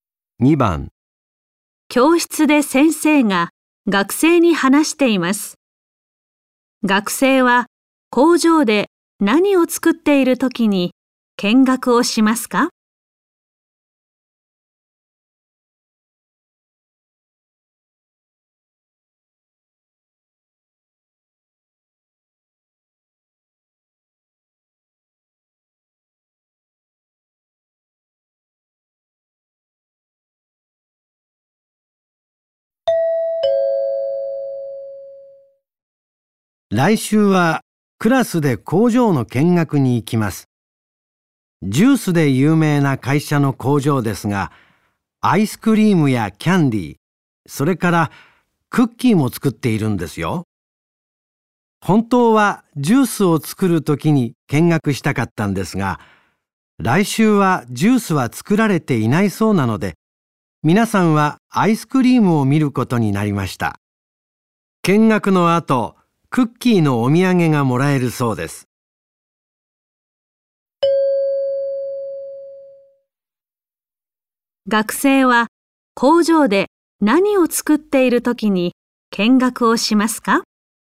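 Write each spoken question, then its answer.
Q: 学生は工場で何を作っているときに見学をしますか?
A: アイスクリーム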